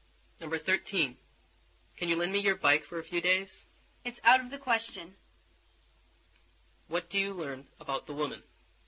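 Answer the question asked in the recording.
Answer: She won't lend him her bike.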